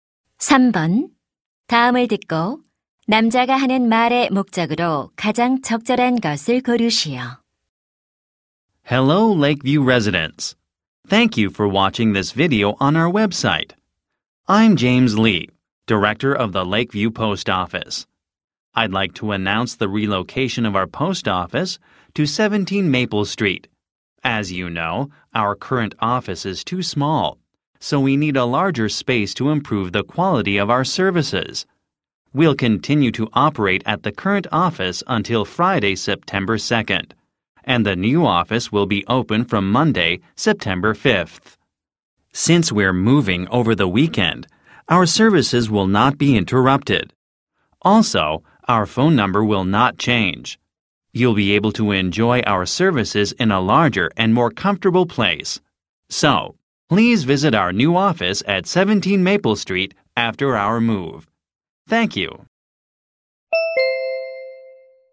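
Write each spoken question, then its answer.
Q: 다음을 듣고 남자가 하는 말의 목적으로 가장 적절한 것을 고르시오.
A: 우체국 이전을 알리려고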